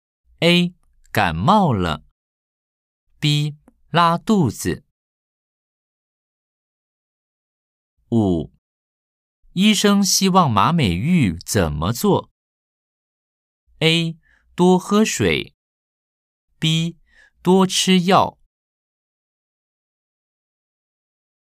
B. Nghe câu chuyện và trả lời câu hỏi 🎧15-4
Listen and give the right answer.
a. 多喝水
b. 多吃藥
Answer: a. 多喝水